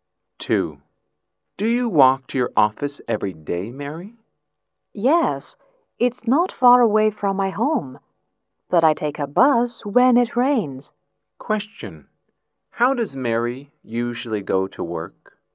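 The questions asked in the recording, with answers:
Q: How does Mary usually go to work?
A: On foot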